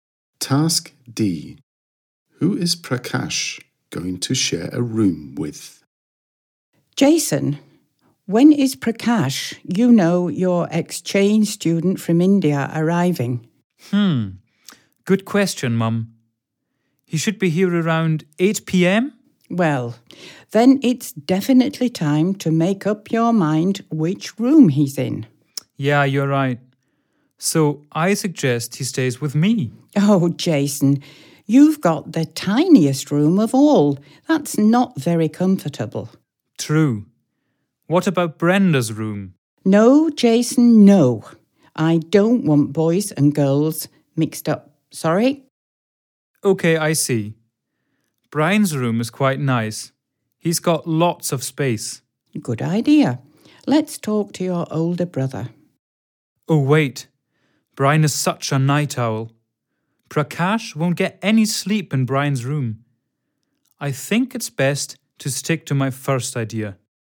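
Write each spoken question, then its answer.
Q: Who is Prakash going to share a room with?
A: Jason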